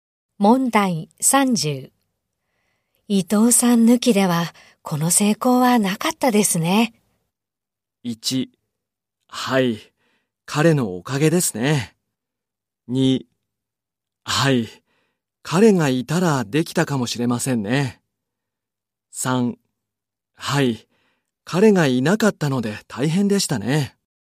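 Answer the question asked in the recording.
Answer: 1: はい、彼のおかげですね。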